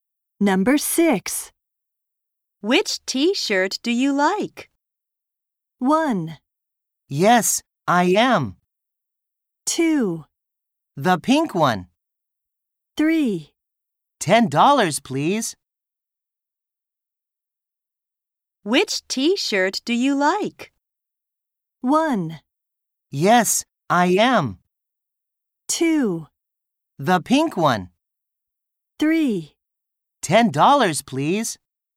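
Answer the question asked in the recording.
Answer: 2: The pink one.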